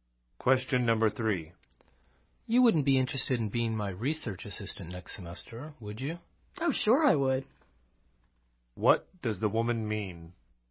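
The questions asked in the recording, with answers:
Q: What does the woman mean?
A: She would like to be his research assistant.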